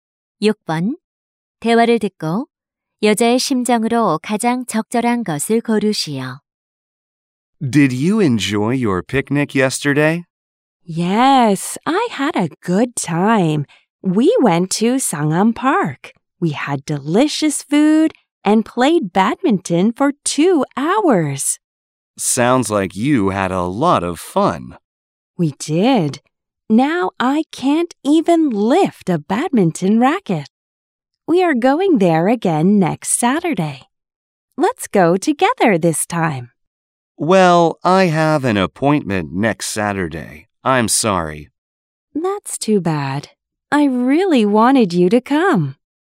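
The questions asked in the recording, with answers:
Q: 대화를 듣고 여자의 심정으로 가장 적절한 것을 고르시오.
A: 실망함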